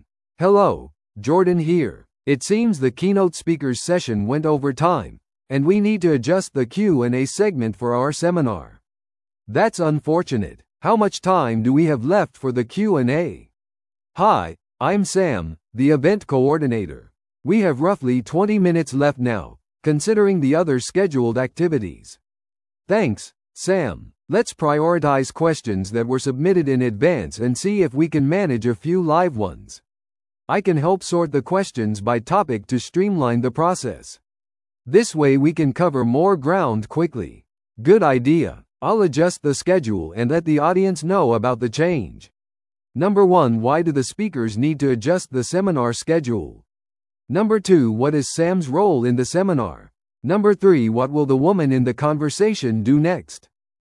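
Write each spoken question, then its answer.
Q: why do the speakers need to adjust the seminar schedule?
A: The keynote speaker's session went over time

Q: what is Sam's role in the seminar?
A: Event coordinator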